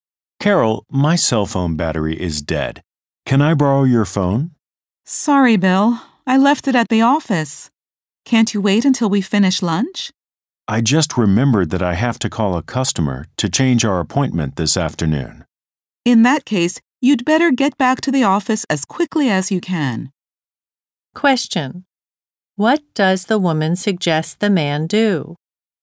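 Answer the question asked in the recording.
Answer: Go back to the office as quickly as he can.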